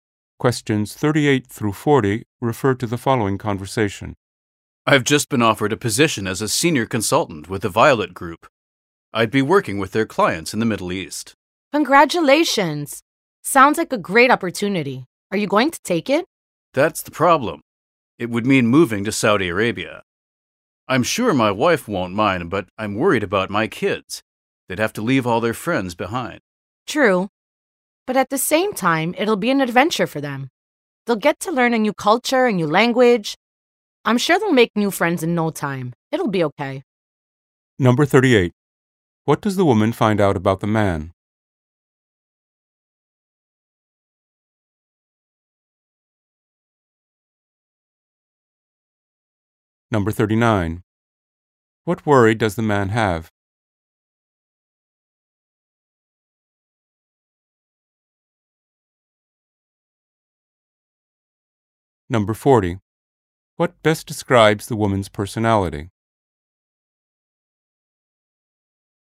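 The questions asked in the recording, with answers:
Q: What does the woman find out about the man?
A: He was offered a senior consultant position with the Violet Group

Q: What worry does the man have?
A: His kids would have to leave their friends behind

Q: What best describes the woman's personality?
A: Optimistic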